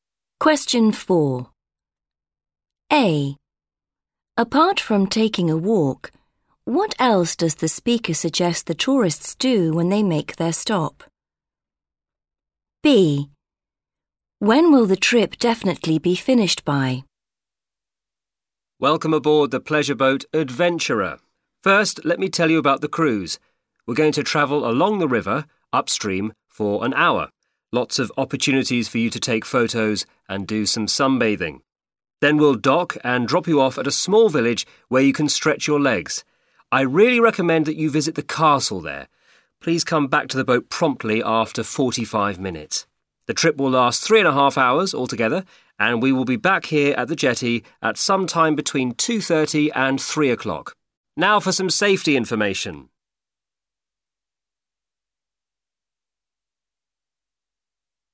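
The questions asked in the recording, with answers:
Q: Apart from taking a walk, what else does the speaker suggest the tourists do when they make their stop?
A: visit the castle

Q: When will the trip definitely be finished by?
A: 3 o'clock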